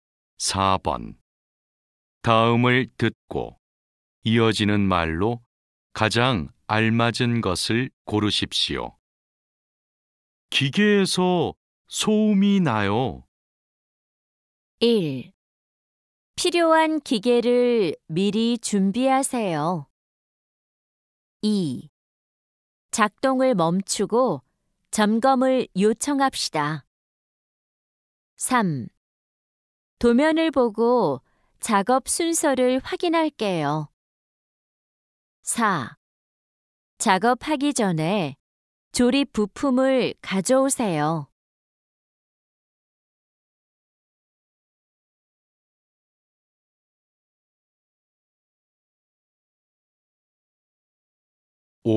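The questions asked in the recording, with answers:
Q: 기계에서 소음이 나요.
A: 2: 작동을 멈추고 점검을 요청합시다.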